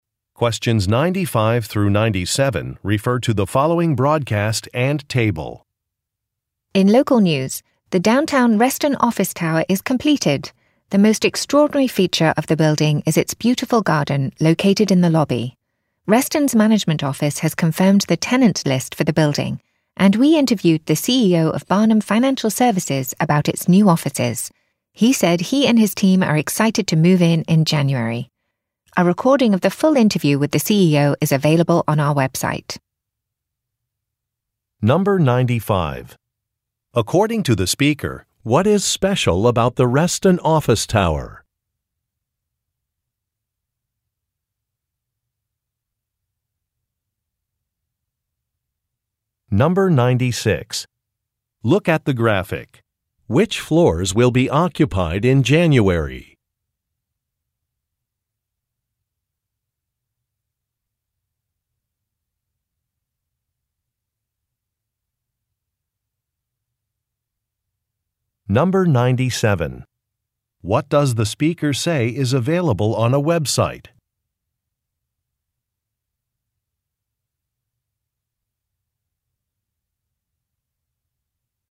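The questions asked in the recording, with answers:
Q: According to the speaker, what is special about the Reston office tower?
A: It has a beautiful garden in the lobby

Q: What does the speaker say is available on a website?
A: A recording of the full interview with the CEO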